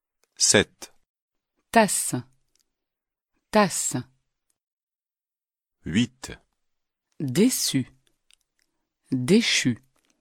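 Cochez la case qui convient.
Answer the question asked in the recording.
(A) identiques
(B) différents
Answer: (A) identiques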